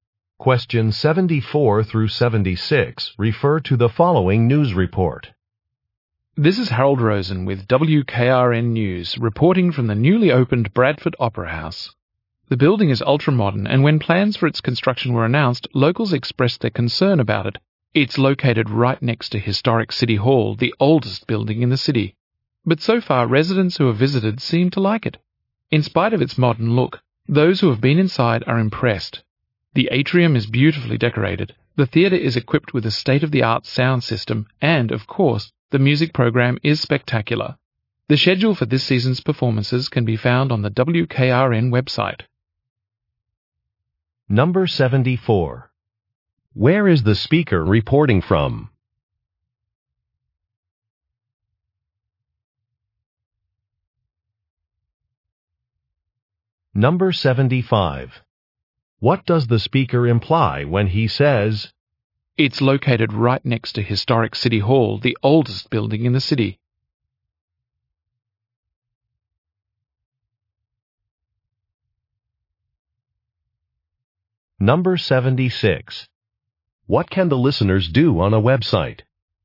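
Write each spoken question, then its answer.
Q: Where is the speaker reporting from?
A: The newly opened Bradford Opera House

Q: What can the listeners do on a website?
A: Find the schedule for this season's performances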